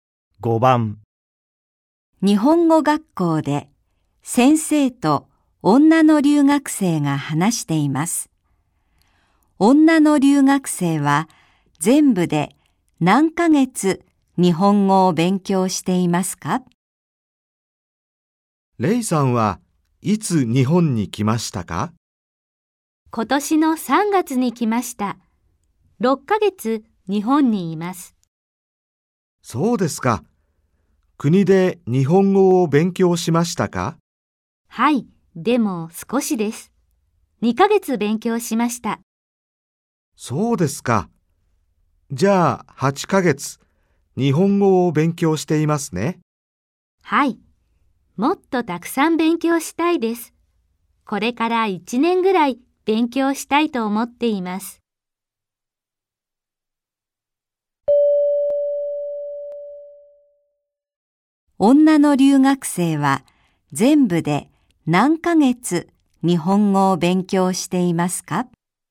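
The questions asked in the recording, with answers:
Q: 女の留学生は、全部で何ヶ月日本語を勉強していますか?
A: 8ヶ月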